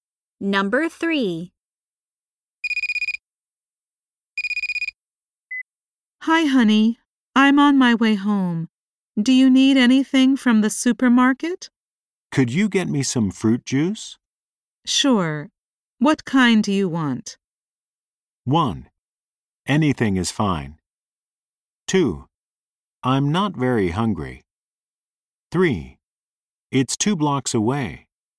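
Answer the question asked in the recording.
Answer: 1: Anything is fine.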